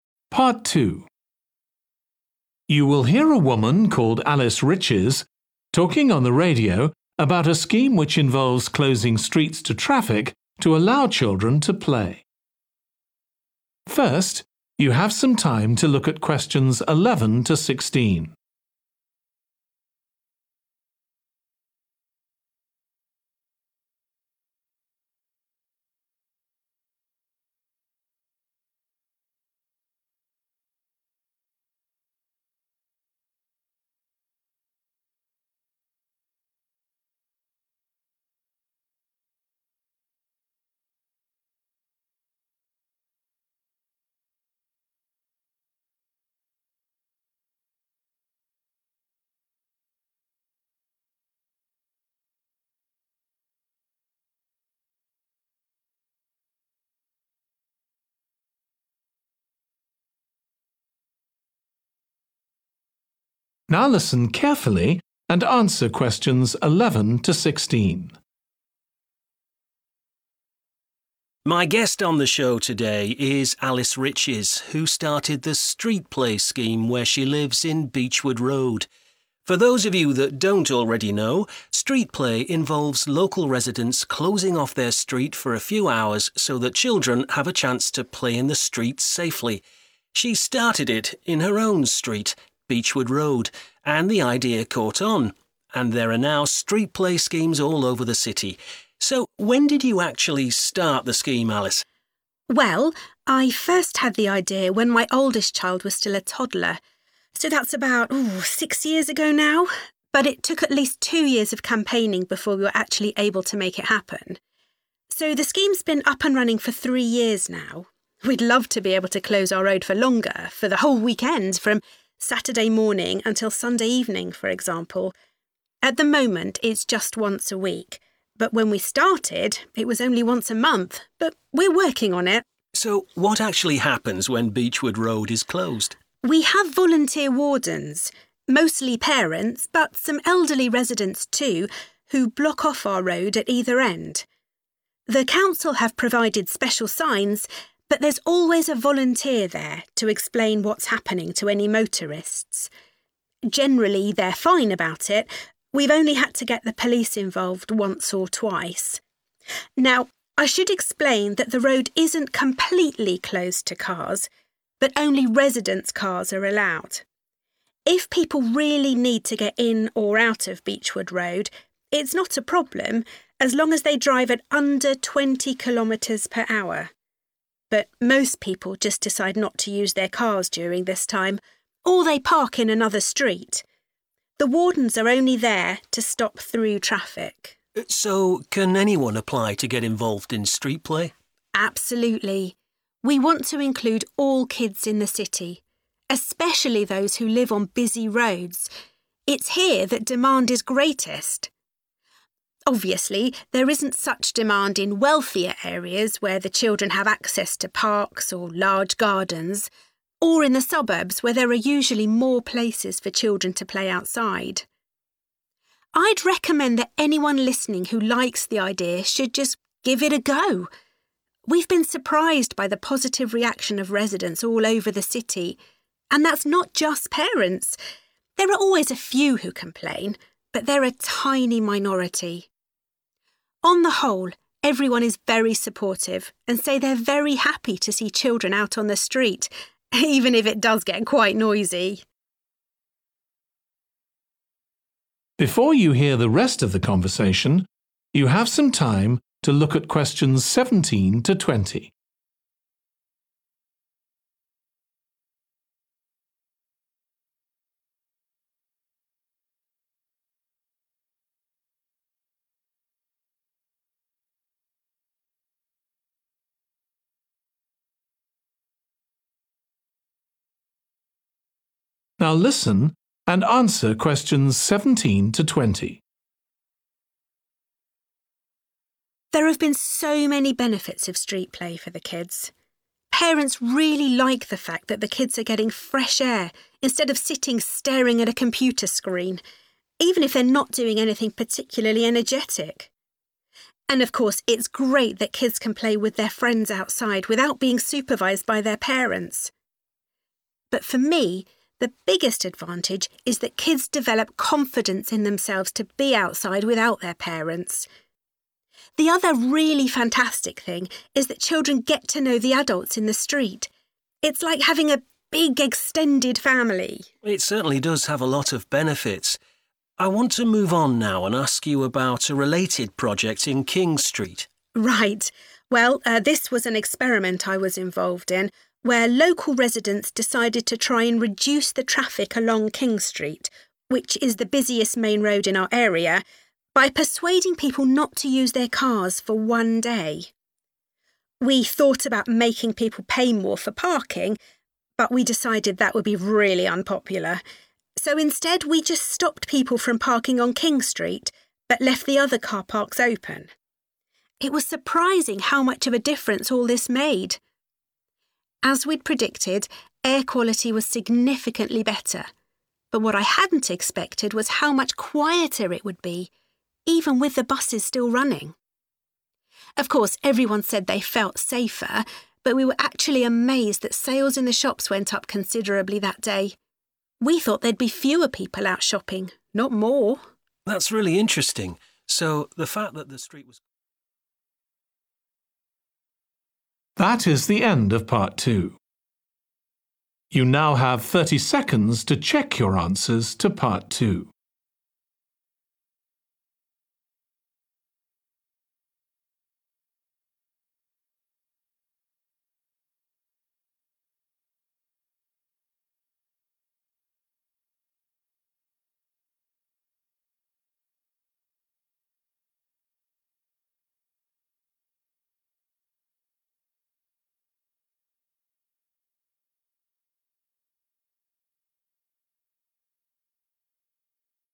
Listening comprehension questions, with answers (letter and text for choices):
Choose the correct letter, A, B or C.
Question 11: When did the Street Play Scheme first take place?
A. two years ago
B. three years ago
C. six years ago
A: B. three years ago

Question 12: How often is Beechwood Road closed to traffic now?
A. once a week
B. on Saturdays and Sundays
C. once a month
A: A. once a week

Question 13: Who is responsible for closing the road?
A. a council official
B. the police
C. local wardens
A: C. local wardens

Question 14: Residents who want to use their cars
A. have to park in another street.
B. must drive very slowly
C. need permission from a warden.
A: B. must drive very slowly

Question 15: Alice says that Street Play Schemes are most needed in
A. wealthy areas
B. quiet suburban areas.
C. areas with heavy traffic.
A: C. areas with heavy traffic.

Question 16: What has been the reaction of residents who are not parents?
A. Many of them were unhappy at first.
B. They like seeing children play in the street.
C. They are surprised by the lack of noise.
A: B. They like seeing children play in the street.

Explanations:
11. So the scheme's been up and running for three years now. Excerpt/Transcript Explanation: The transcript is saying that the Street Play Scheme has been happening for three years already. Answer Explanation: The answer indicates that the Street Play Scheme first took place three years ago. Reason For Correctness: The correct answer is 'B' because the text explicitly states that the scheme has been running for three years now, aligning with the answer choice that mentions 'three years ago'. Therefore, 'B' is the correct choice based on the information provided in the excerpt.
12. At the moment it's just once a week. Excerpt/Transcript Explanation: The transcript says that right now the street is closed one time every week. Answer Explanation: The answer indicates that Beechwood Road is currently closed to traffic once a week. Reason For Correctness: The correct answer is A because the excerpt explicitly states that the road is only closed once a week, which aligns with the answer choice A 'once a week.'
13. We have volunteer wardens, mostly parents but some elderly residents too, who block off our road at either end. Excerpt/Transcript Explanation: The transcript mentions that there are volunteer wardens who block the road at both ends. These wardens are described as parents and elderly residents. Answer Explanation: The answer choice 'C' (local wardens) is correct. Reason For Correctness: The correct answer is 'C' because the excerpt specifically states that volunteer wardens, which include parents and elderly residents, are the ones responsible for blocking off the road. This aligns with the answer choice 'local wardens'.
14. as long as they drive at under 20 kilometres per hour. Excerpt/Transcript Explanation: The transcript means that residents should drive their cars at a slow speed of under 20 kilometers per hour. Answer Explanation: The answer means that residents who want to use their cars must drive very slowly. Reason For Correctness: The correct answer is 'B' because the excerpt states that residents can use their cars as long as they drive at a slow speed of under 20 kilometers per hour. This aligns with the answer choice that mentions residents needing to drive very slowly.
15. Absolutely – we want to include all kids in the city – especially those who live on busy roads. Excerpt/Transcript Explanation: The transcript talks about wanting to involve all children in the city, especially those living on busy roads. Answer Explanation: The answer indicates that Street Play Schemes are most needed in areas with heavy traffic. Reason For Correctness: The correct answer is 'areas with heavy traffic' because the excerpt specifically mentions a focus on including kids living on busy roads. This implies that Street Play Schemes are essential in areas with heavy traffic to provide opportunities for children to play safely despite the traffic congestion.
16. On the whole everyone is very supportive and say they're very happy to see children out on the street Excerpt/Transcript Explanation: The transcript mentions that most people are happy and supportive of seeing children playing in the street. Answer Explanation: The answer indicates that residents who are not parents like seeing children play in the street. Reason For Correctness: The correct answer is 'B' because the excerpt supports this by stating that people are happy to see children out on the street, aligning with the idea that residents who are not parents like observing kids playing in the street.

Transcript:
My guest on the show today is Alice Riches who started the Street Play Scheme where she lives in Beechwood Road. For those of you that don't already know – Street Play involves local residents closing off their street for a few hours so that children have a chance to play in the street safely. She started it in her own street, Beechwood Road, and the idea caught on, and there are now Street Play Schemes all over the city. So when did you actually start the scheme, Alice?
ALICE:
Well, I first had the idea when my oldest child was still a toddler, so that's about six years ago now – but it took at least two years of campaigning before we were actually able to make it happen. So the scheme's been up and running for three years now. We'd love to be able to close our road for longer – for the whole weekend, from Saturday morning until Sunday evening, for example. At the moment it's just once a week. But when we started it was only once a month. But we're working on it.
So what actually happens when Beechwood Road is closed?
ALICE:
We have volunteer wardens, mostly parents but some elderly residents too, who block off our road at either end. The council have provided special signs but there's always a volunteer there to explain what's happening to any motorists. Generally, they're fine about it – we've only had to get the police involved once or twice.
Now I should explain that the road isn't completely closed to cars. But only residents' cars are allowed. If people really need to get in or out of Beechwood Road, it's not a problem – as long as they drive at under 20 kilometres per hour. But most people just decide not to use their cars during this time, or they park in another street. The wardens are only there to stop through traffic.
So can anyone apply to get involved in Street Play?
ALICE:
Absolutely – we want to include all kids in the city – especially those who live on busy roads. It's here that demand is greatest. Obviously, there isn't such demand in wealthier areas where the children have access to parks or large gardens – or in the suburbs where there are usually more places for children to play outside.
I'd recommend that anyone listening who likes the idea should just give it a go. We've been surprised by the positive reaction of residents all over the city. And that's not just parents. There are always a few who complain but they're a tiny minority. On the whole everyone is very supportive and say they're very happy to see children out on the street – even if it does get quite noisy.
ALICE:
There have been so many benefits of Street Play for the kids. Parents really like the fact that the kids are getting fresh air instead of sitting staring at a computer screen, even if they're not doing anything particularly energetic. And of course it's great that kids can play with their friends outside without being supervised by their parents – but for me the biggest advantage is that kids develop confidence in themselves to be outside without their parents. The other really fantastic thing is that children get to know the adults in the street – it's like having a big extended family.
It certainly does have a lot of benefits. I want to move on now and ask you about a related project in King Street.
ALICE:
Right. Well this was an experiment I was involved in where local residents decided to try and reduce the traffic along King Street, which is the busiest main road in our area, by persuading people not to use their cars for one day. We thought about making people pay more for parking – but we decided that would be really unpopular – so instead we just stopped people from parking on King Street but left the other car parks open.
It was surprising how much of a difference all this made. As we'd predicted, air quality was significantly better but what I hadn't expected was how much quieter it would be – even with the buses still running. Of course everyone said they felt safer but we were actually amazed that sales in the shops went up considerably that day – we thought there'd be fewer people out shopping – not more.
That's really interesting so the fact that ...